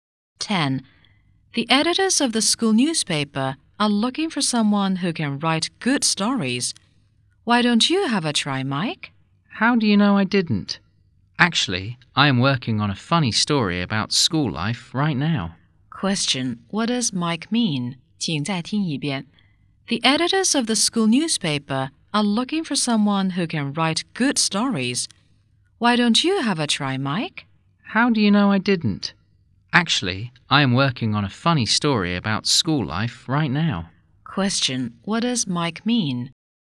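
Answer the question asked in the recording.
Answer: He is already writing a story for the newspaper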